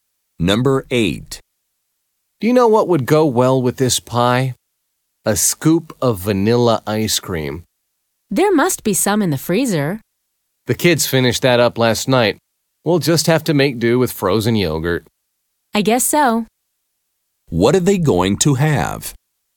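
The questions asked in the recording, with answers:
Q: What are they going to have?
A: Pie with frozen yogurt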